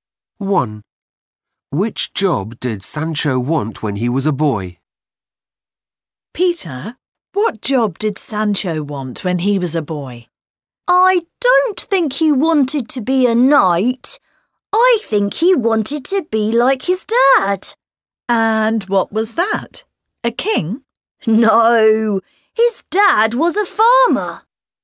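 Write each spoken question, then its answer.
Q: Which job did Sancho want when he was a boy?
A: farmer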